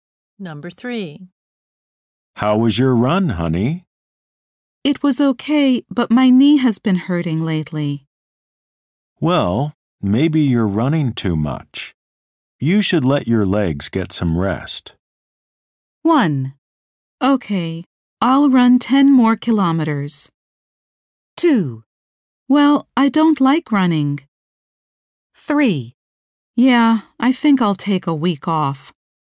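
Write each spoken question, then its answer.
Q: You should let your legs get some rest.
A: 3: Yeah, I think I'll take a week off.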